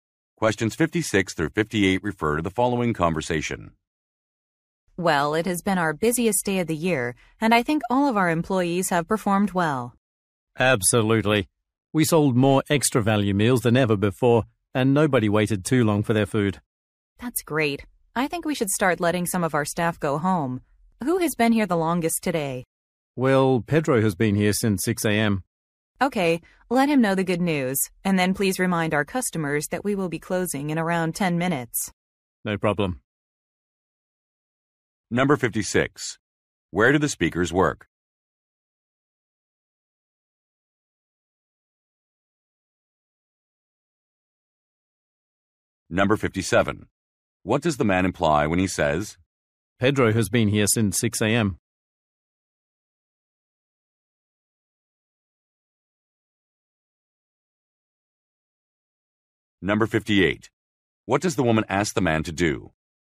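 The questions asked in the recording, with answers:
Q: Where do the speakers work?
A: At a fast-food restaurant

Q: What does the man imply when he says,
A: Pedro should be allowed to go home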